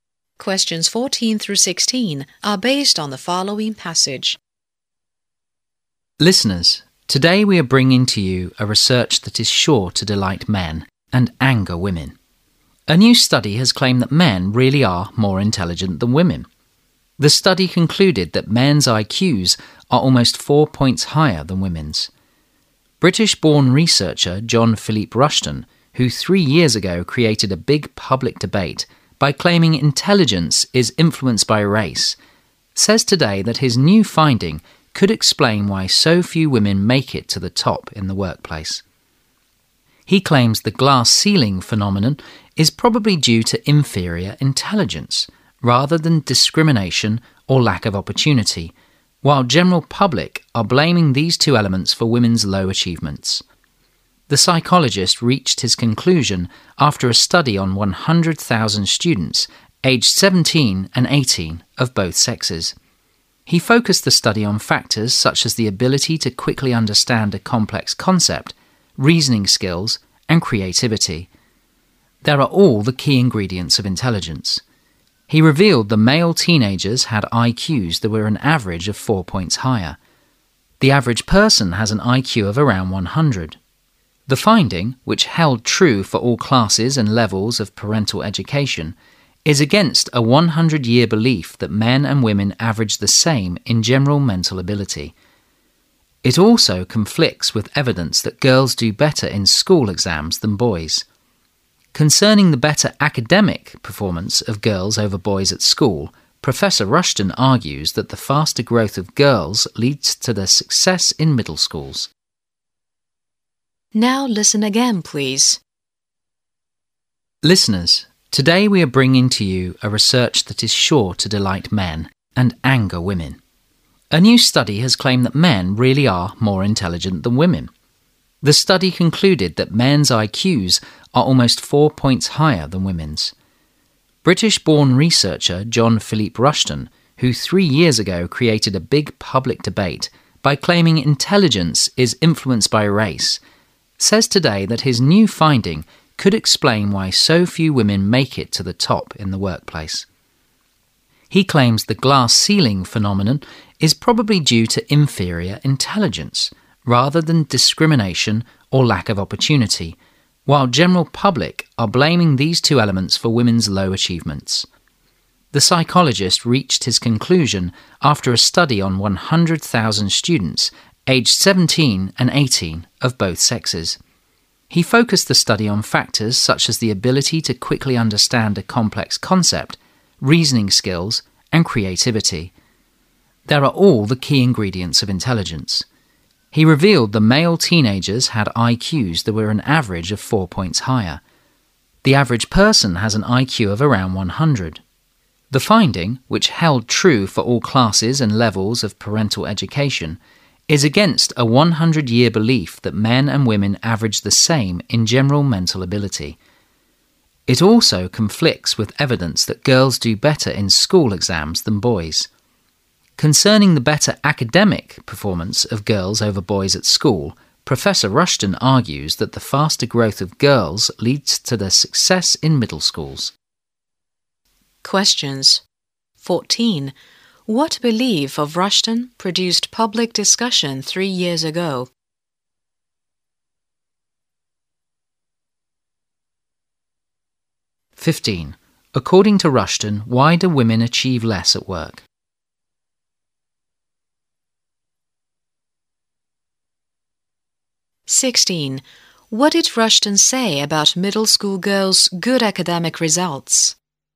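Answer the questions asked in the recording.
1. That intelligence is influenced by race
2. Because of inferior intelligence
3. They result from girls' faster growth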